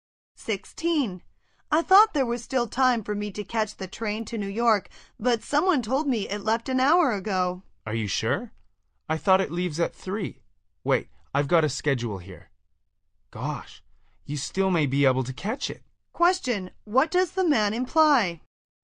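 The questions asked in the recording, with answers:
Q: what does the man imply?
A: The train hasn't left yet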